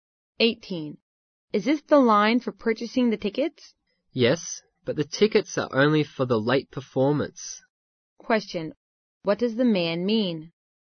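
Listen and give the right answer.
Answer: The tickets sold there are only for the late performance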